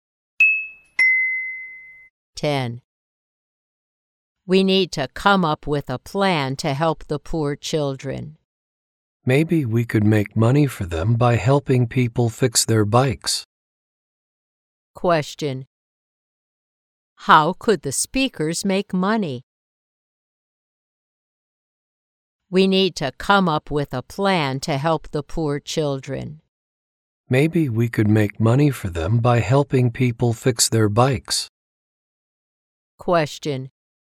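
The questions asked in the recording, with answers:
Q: How could the speakers make money?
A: By helping people fix their bikes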